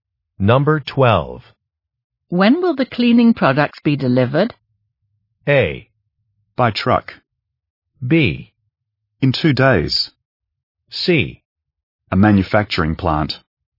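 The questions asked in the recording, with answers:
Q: When will the cleaning products be delivered?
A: B: In 2 days.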